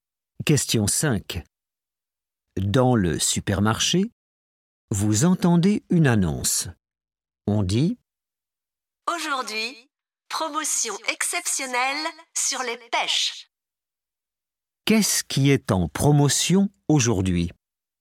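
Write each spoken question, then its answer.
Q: Qu'est-ce qui est en promotion aujourd'hui?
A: les pêches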